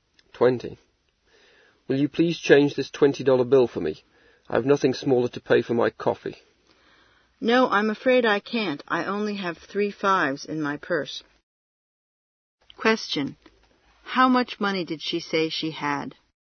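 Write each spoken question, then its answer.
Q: How much money did she say she had?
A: $15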